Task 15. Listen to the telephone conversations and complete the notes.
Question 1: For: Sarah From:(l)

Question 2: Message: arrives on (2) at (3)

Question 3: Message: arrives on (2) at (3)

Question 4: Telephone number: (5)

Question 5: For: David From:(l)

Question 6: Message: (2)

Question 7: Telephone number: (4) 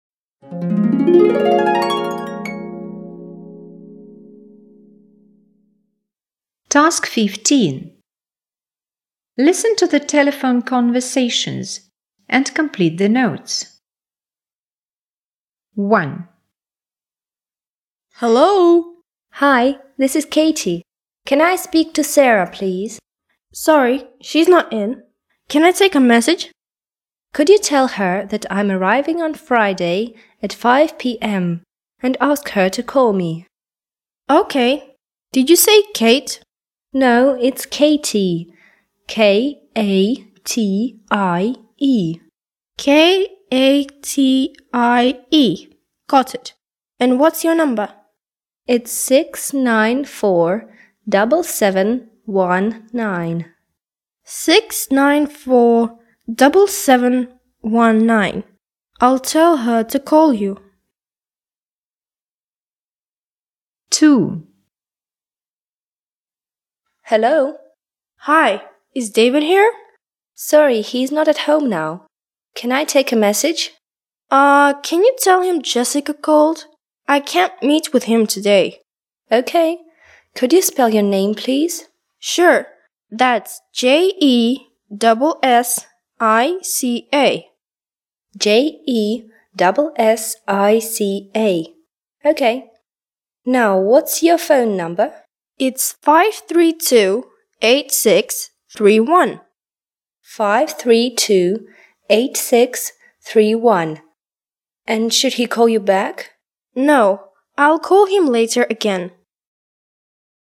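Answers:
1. Katie
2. Friday
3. 5 p.m.
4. 694-7719
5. Jessica
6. can't meet him today
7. 532-8631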